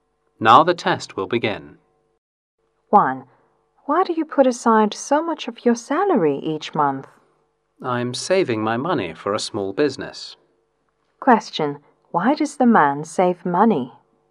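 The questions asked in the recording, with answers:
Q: Question, why does the man save money?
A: To start a small business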